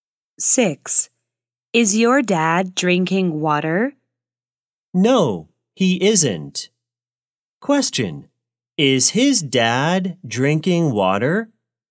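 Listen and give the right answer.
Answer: No, he isn't.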